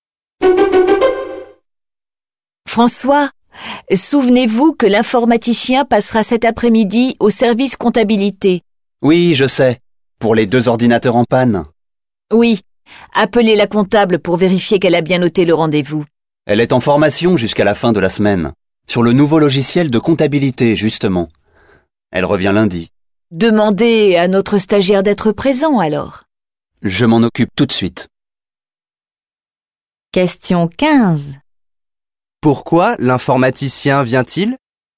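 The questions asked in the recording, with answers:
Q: Pourquoi l'informaticien vient-il?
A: Pour réparer deux ordinateurs en panne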